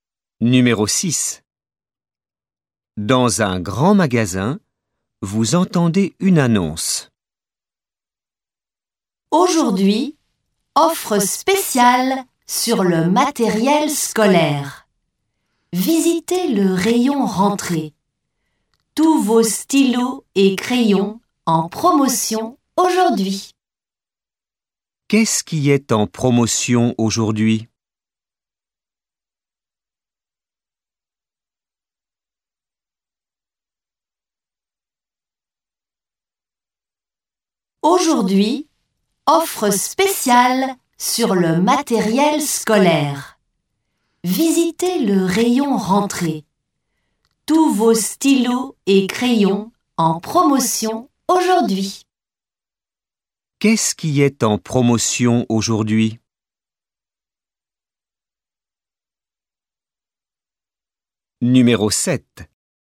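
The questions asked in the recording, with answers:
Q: Qu'est-ce qui est en promotion aujourd'hui ?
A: Les stylos et crayons (matériel scolaire)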